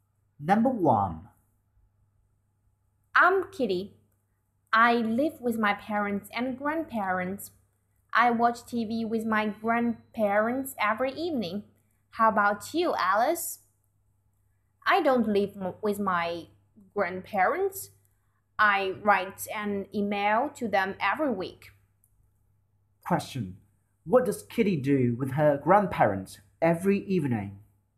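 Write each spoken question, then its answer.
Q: What does Kitty do with her grandparents every evening?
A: She watches TV with them.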